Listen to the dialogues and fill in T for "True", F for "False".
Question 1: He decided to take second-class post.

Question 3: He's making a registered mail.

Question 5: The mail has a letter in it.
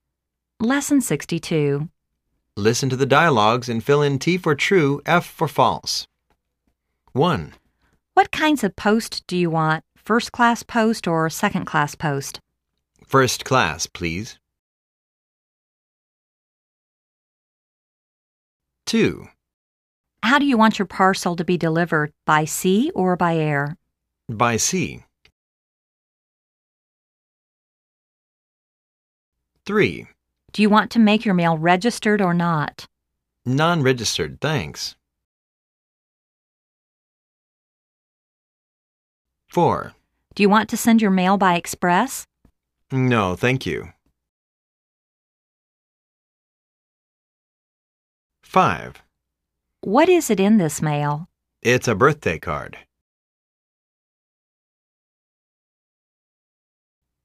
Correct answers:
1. F
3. F
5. F